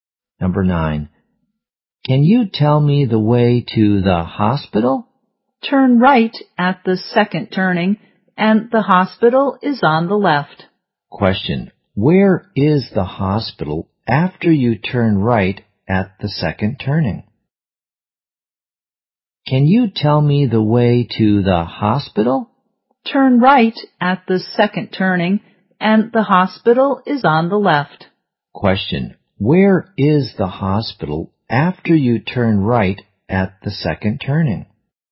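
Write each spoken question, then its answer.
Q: Question. Where is the hospital after you turn right at the second turning?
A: On the left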